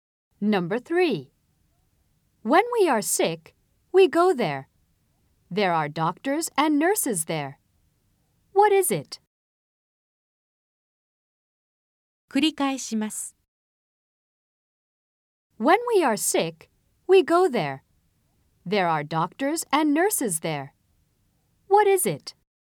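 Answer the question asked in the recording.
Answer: a hospital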